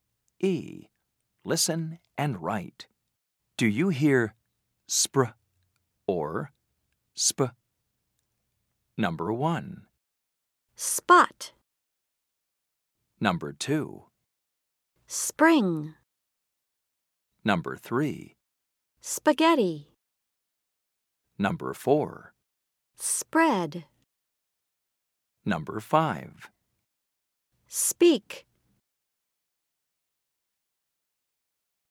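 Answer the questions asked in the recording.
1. sp (spot)
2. spr (spring)
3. sp (spaghetti)
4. spr (spread)
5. sp (speak)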